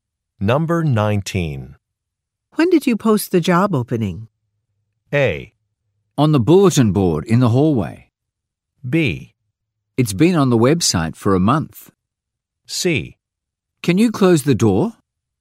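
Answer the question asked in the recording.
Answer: B: It's been on the website for a month.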